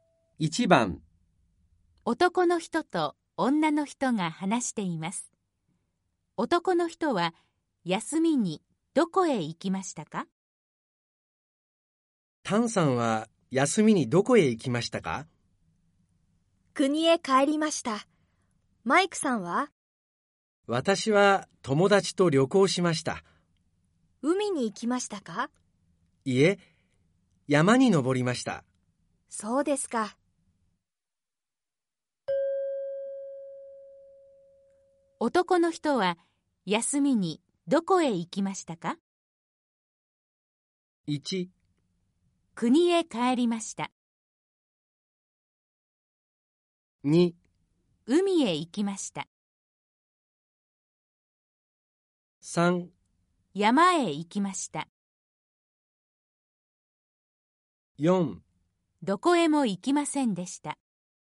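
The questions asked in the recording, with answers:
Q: 男の人は休みにどこへ行きましたか?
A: 3: 山へ行きました。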